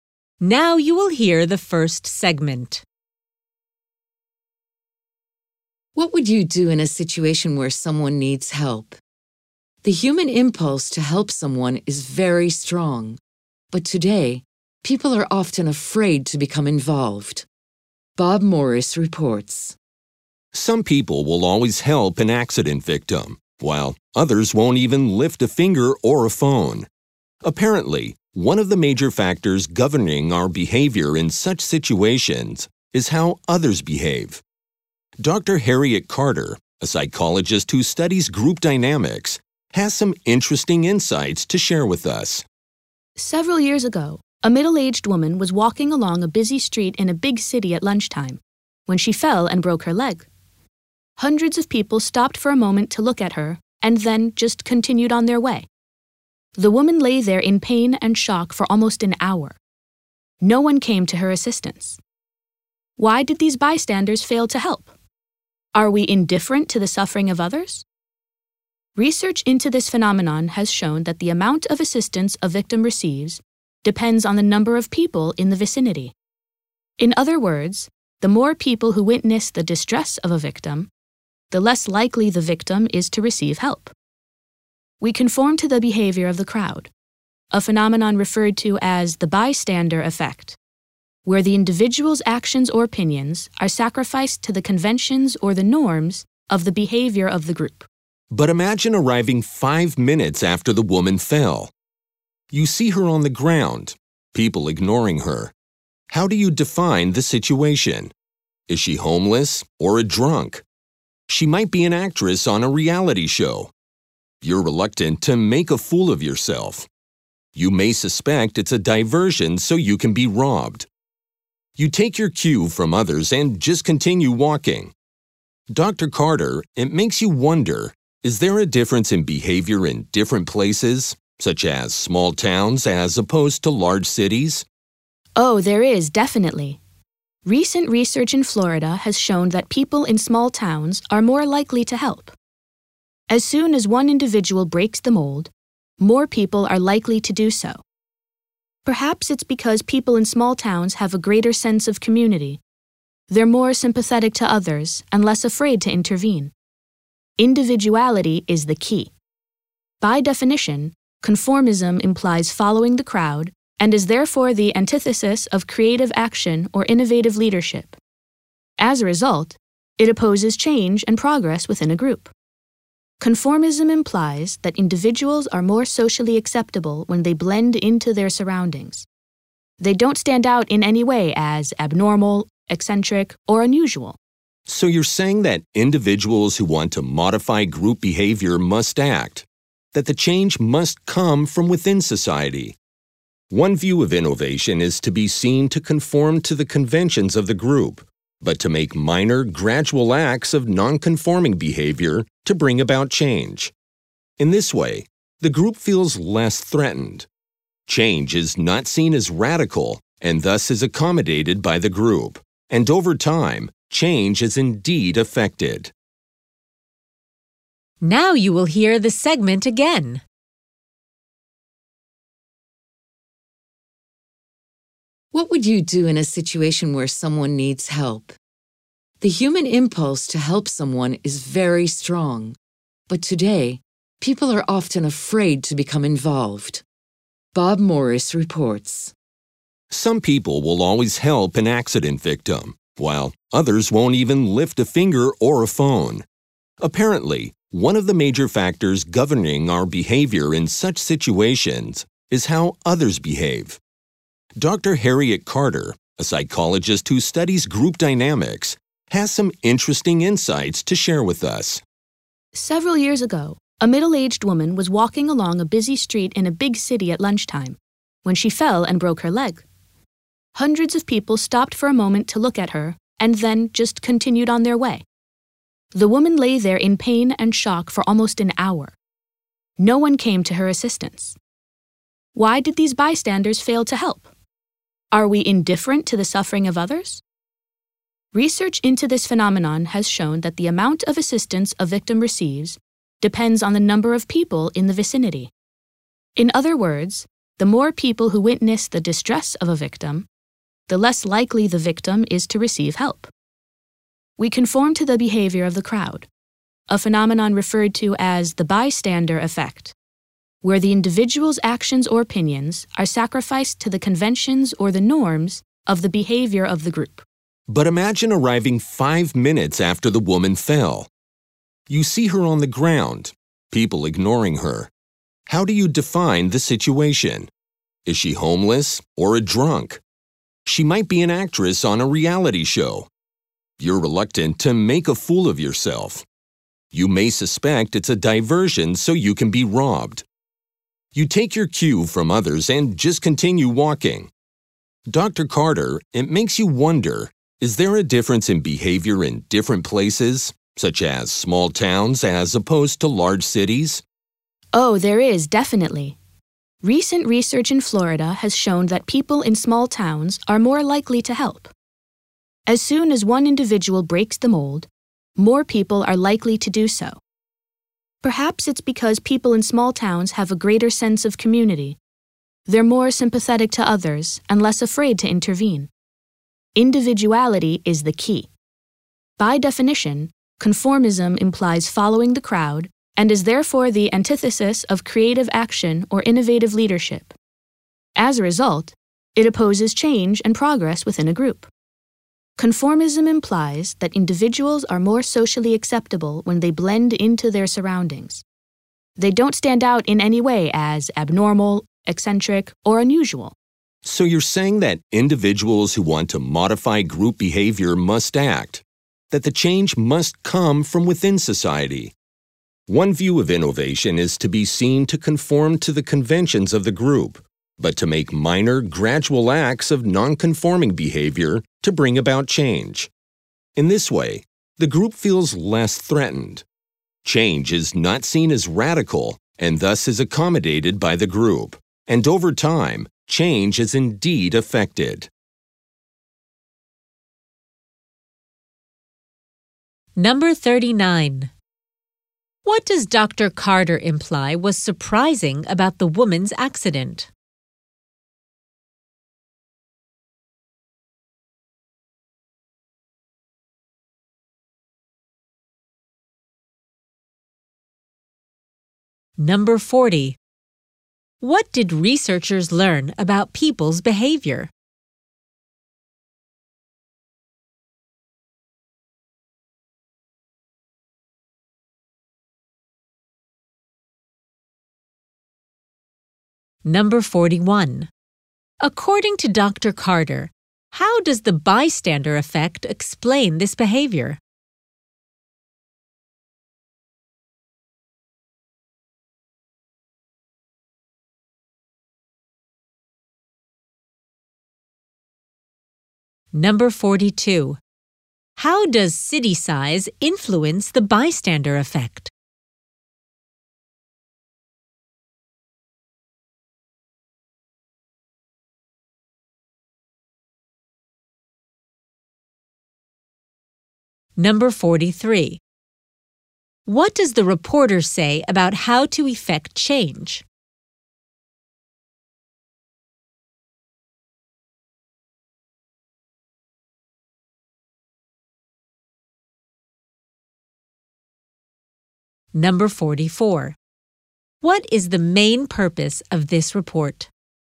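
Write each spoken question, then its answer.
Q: What did researchers learn about people's behavior?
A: The more people who see a victim, the less likely the victim is to get help

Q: According to Dr. Carter, how does the bystander effect explain this behavior?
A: People follow the behavior of the crowd and put aside their own actions or opinions

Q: How does city size influence the bystander effect?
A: People in small towns are more likely to help

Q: What does the reporter say about how to effect change?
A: Go along with the group's conventions but make small, gradual acts of non-conforming behavior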